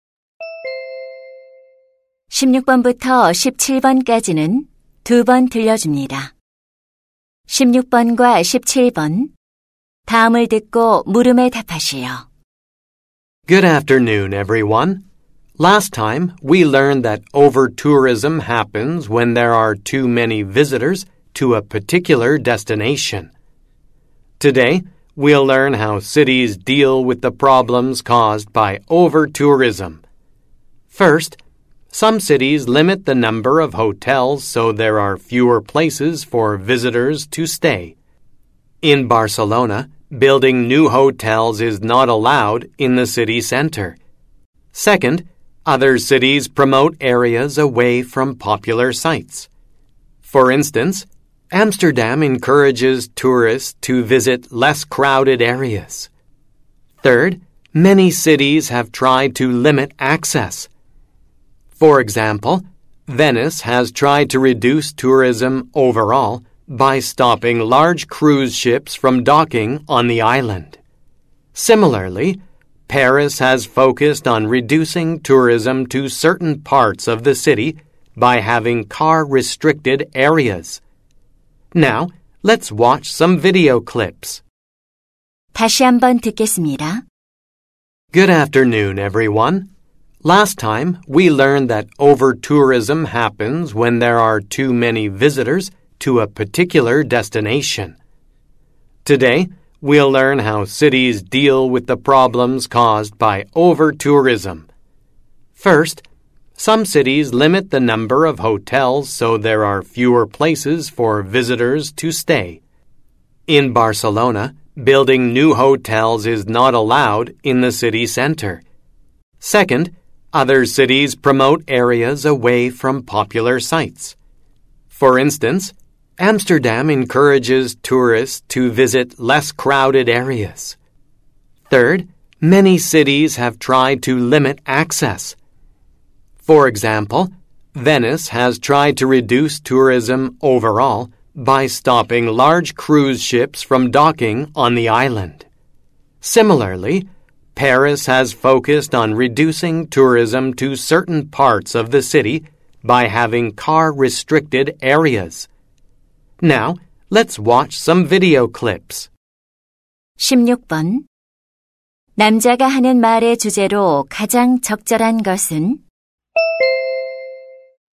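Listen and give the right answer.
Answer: 도시들이 과잉 관광 문제에 대처하는 방법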